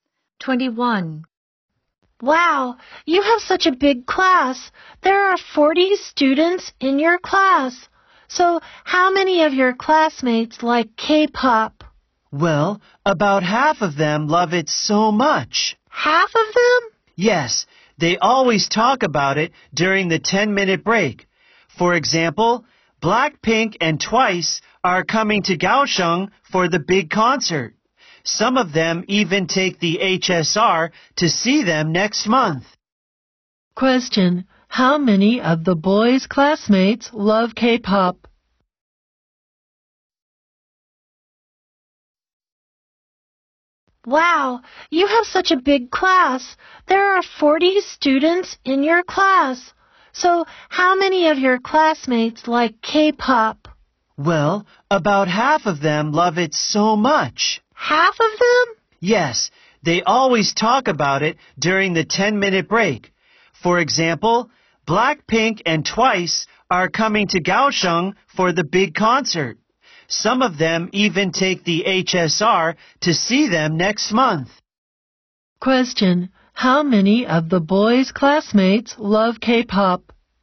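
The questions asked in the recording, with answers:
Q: how many of the boys' classmates love K-pop?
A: About half of them (about 20)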